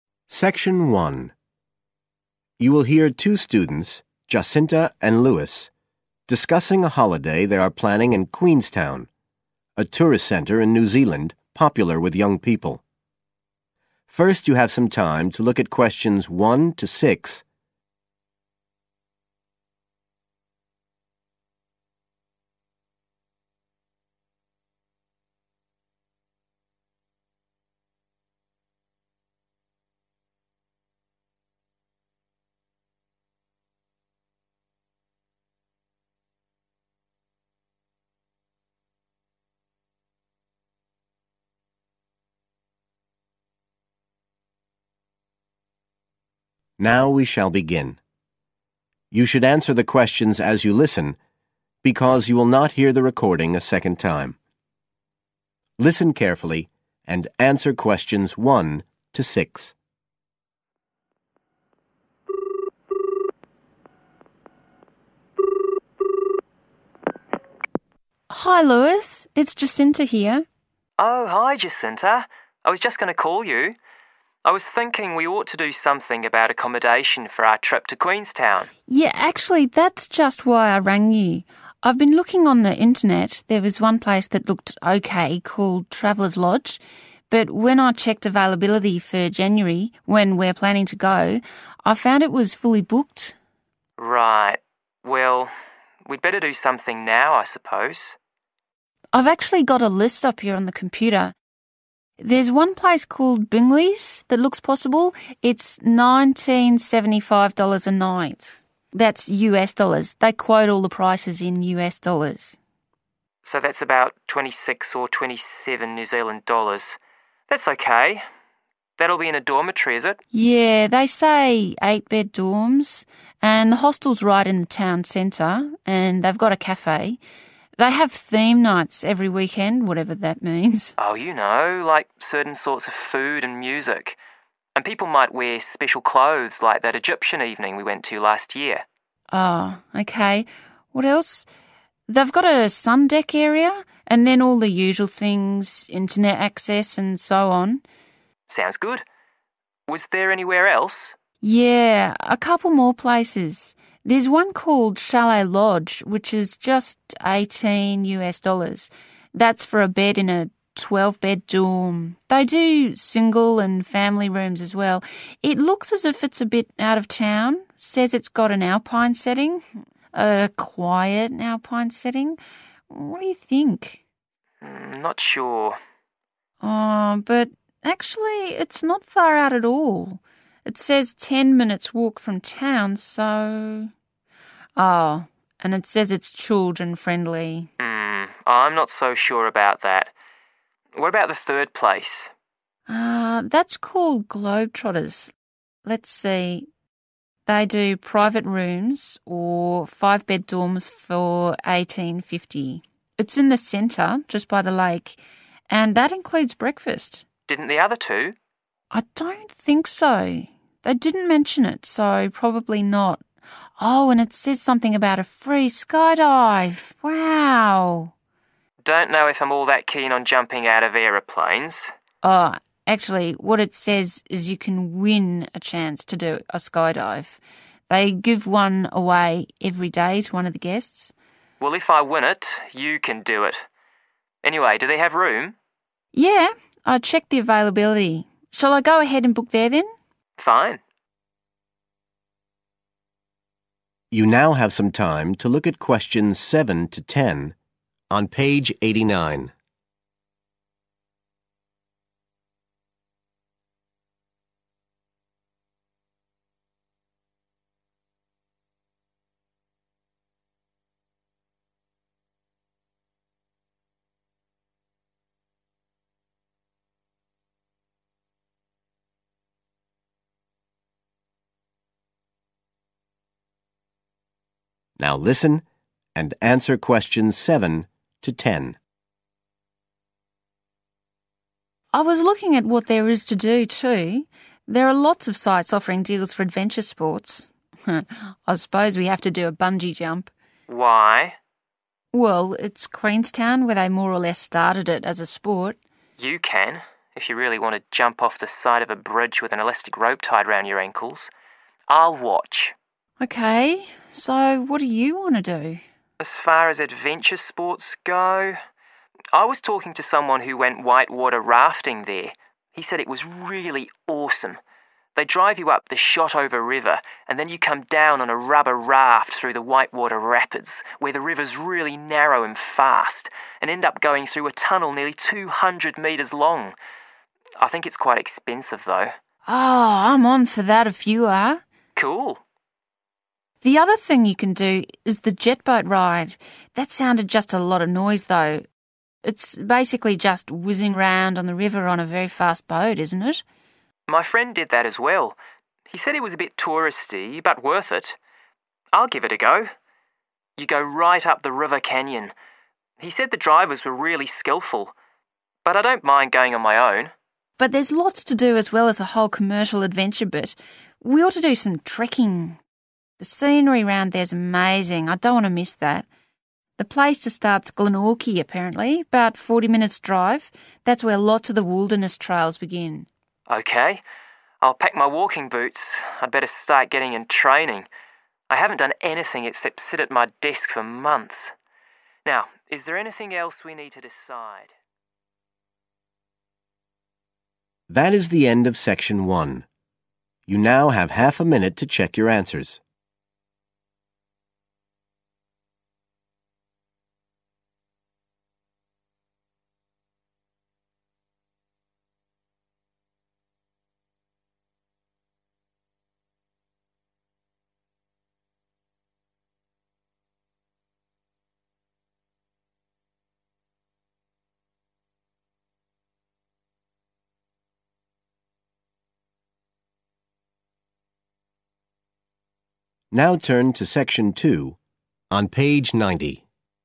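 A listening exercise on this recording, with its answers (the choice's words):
Complete the form below. Write NO MORE THAN THREE WORDS AND/OR A NUMBER for each answer.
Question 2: cafe with regular 2...................nights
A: theme

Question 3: located in a 3............. alpine setting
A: quiet

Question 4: 4........... are welcome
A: children

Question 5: 5........... included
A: breakfast

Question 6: chance to win a 6..........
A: skydive

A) only Jacinta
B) only Lewis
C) both Jacinta and Lewis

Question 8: white-water rafting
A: both Jacinta and Lewis

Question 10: trekking on wilderness trail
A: both Jacinta and Lewis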